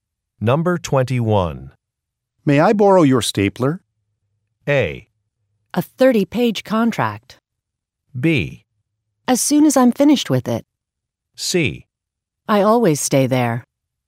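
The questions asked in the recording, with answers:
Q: May I borrow your stapler?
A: B: As soon as I'm finished with it.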